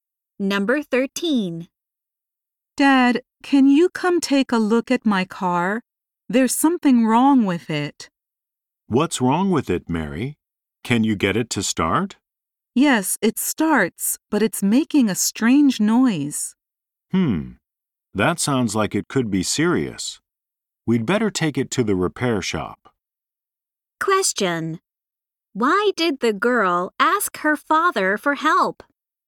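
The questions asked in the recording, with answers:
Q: Why did the girl ask her father for help?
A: Her car is making a strange noise.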